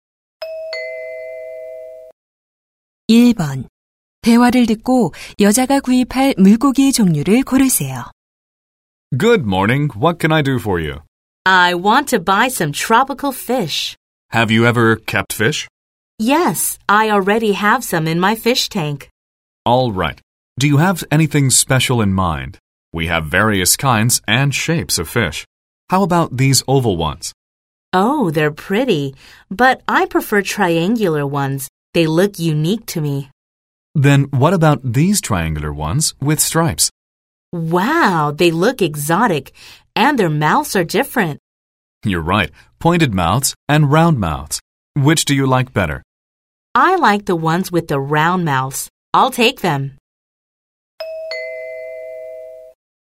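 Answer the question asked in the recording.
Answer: 줄무늬가 있고 입이 둥근 삼각형 물고기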